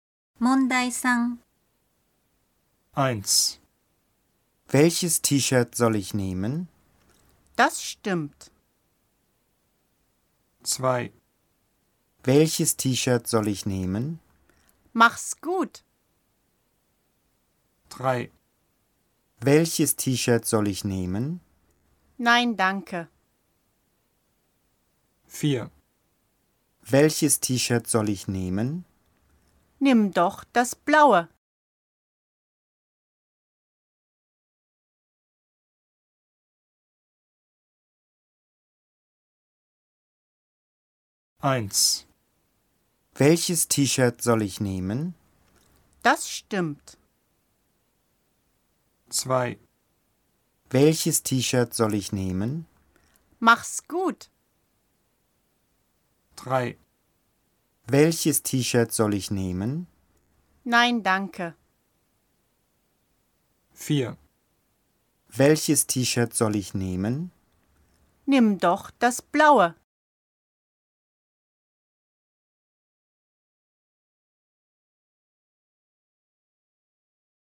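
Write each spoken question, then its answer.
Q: Welches T-Shirt soll ich nehmen?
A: 4: Nimm doch das blaue.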